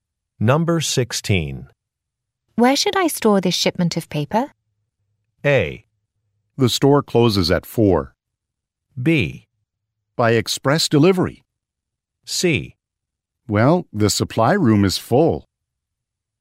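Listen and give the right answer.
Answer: C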